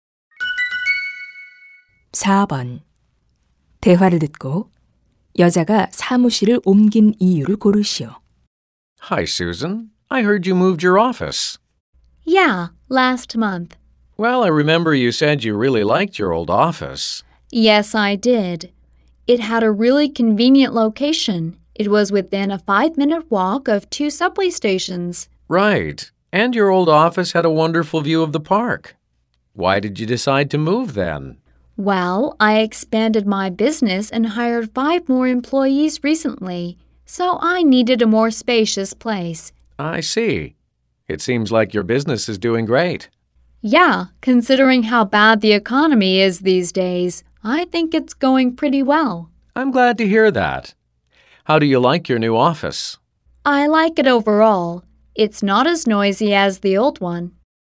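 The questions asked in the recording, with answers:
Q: 대화를 듣고 여자가 사무실을 옮긴 이유를 고르시오.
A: 사업 확장으로 더 넓은 공간이 필요해서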